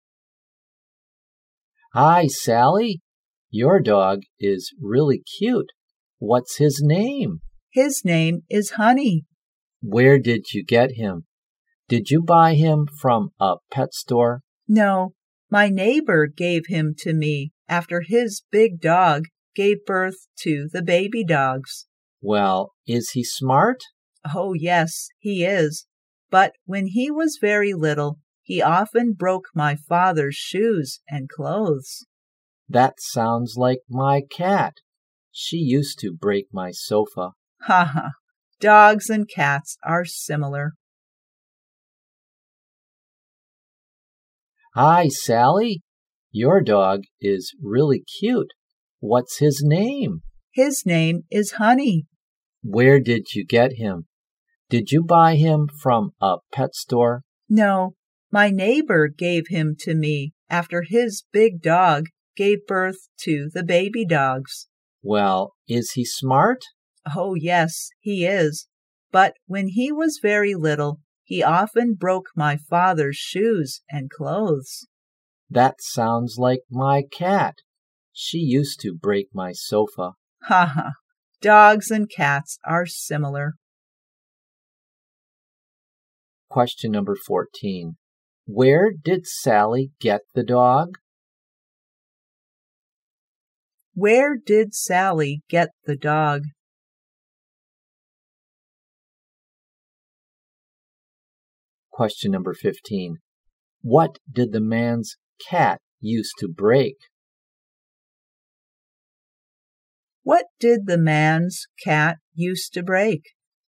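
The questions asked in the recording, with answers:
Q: Where did Sally get the dog?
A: From her neighbor

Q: What did the man's cat used to break?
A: The sofa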